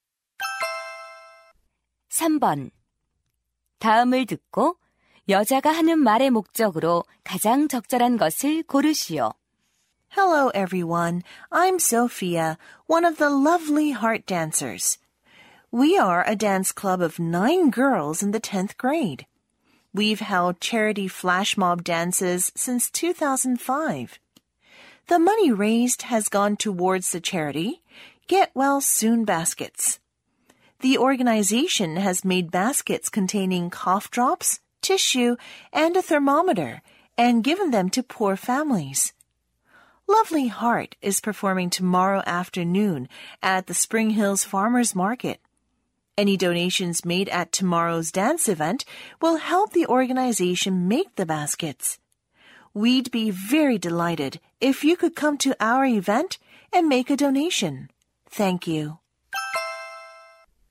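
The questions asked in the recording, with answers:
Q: 다음을 듣고 여자가 하는 말의 목적으로 가장 적절한 것을 고르시오.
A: 자선 댄스 행사 참석과 기부를 요청하려고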